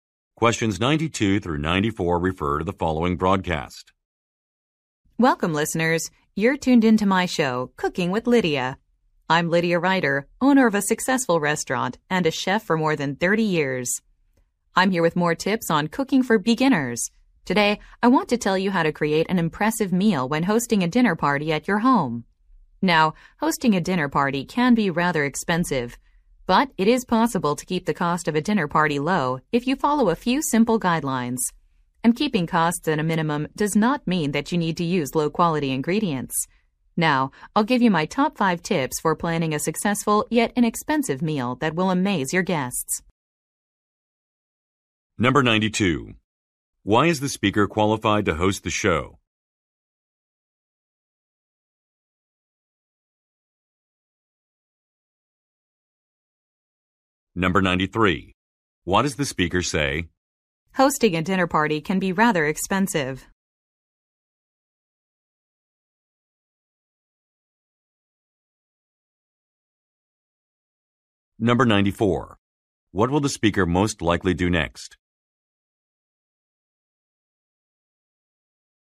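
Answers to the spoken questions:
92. She owns a restaurant and has been a chef for over 30 years
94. Give tips for an inexpensive dinner party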